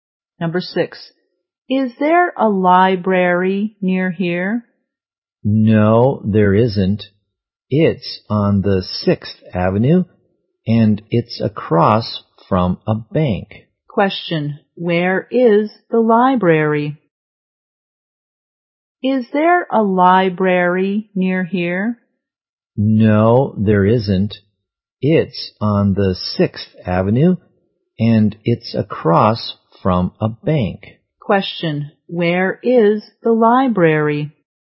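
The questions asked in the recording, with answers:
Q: where is the library?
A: On 6th Avenue, across from a bank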